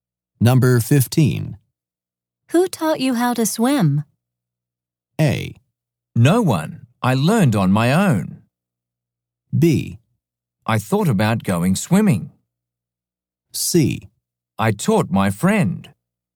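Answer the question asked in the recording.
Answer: A: No one. I learned on my own.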